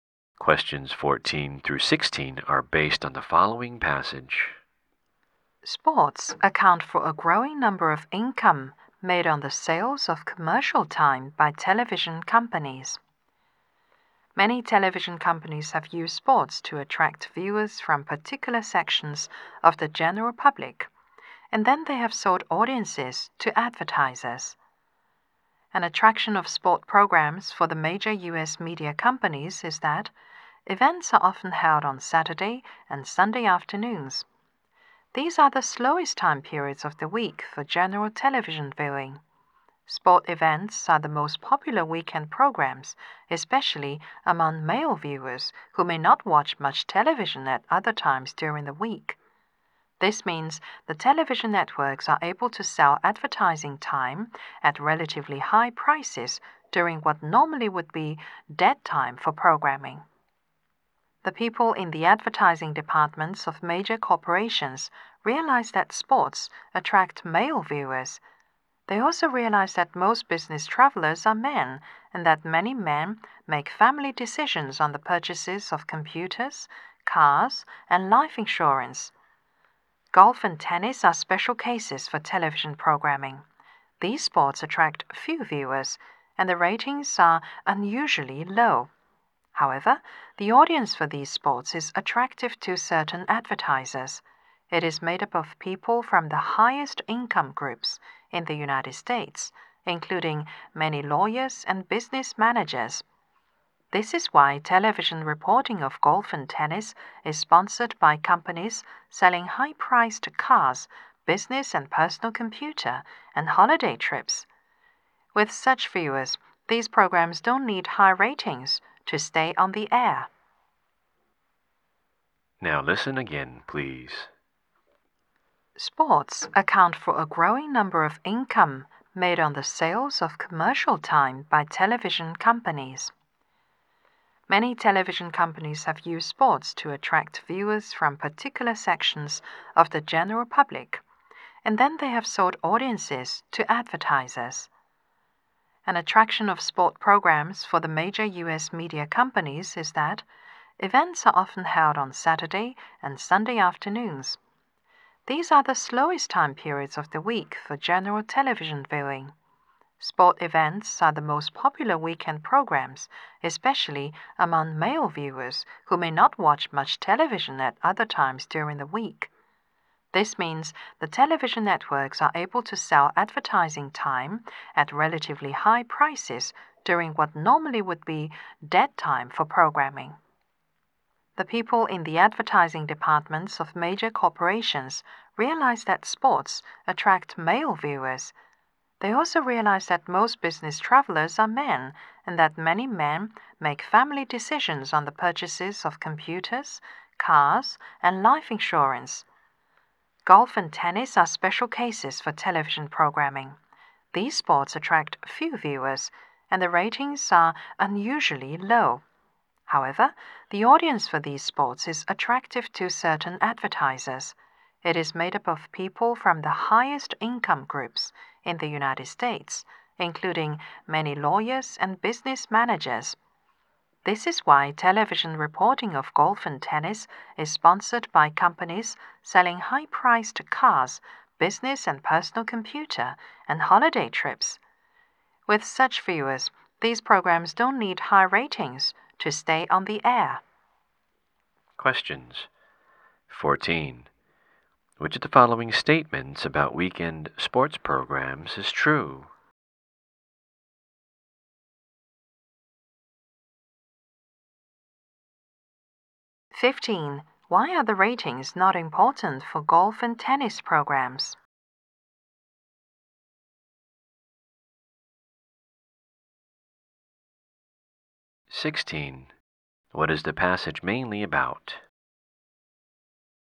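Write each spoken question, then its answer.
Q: Why are the ratings not important for golf and tennis programs?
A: Their viewers come from the highest income groups

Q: What is the passage mainly about?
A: Sports programs and TV advertising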